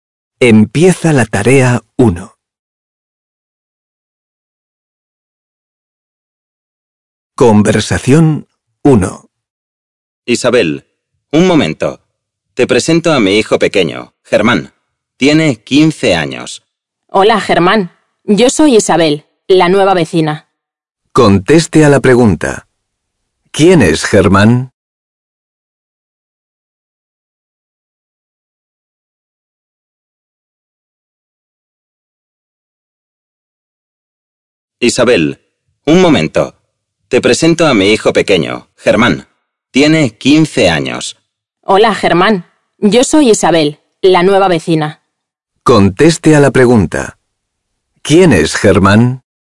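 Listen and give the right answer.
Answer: El hijo pequeño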